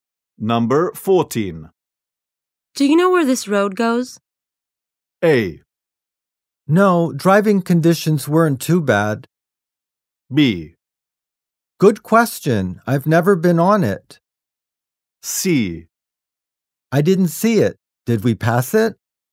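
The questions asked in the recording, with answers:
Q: Do you know where this road goes?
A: B: Good question. I've never been on it.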